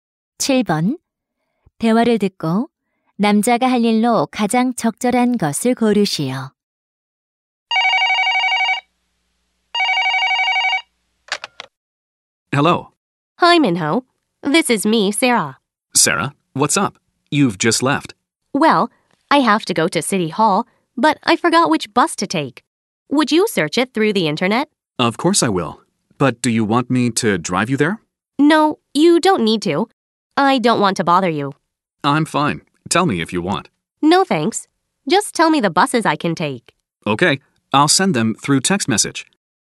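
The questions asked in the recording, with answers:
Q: 대화를 듣고 남자가 할 일로 가장 적절한 것을 고르시오.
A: 탈 수 있는 버스를 문자로 보내기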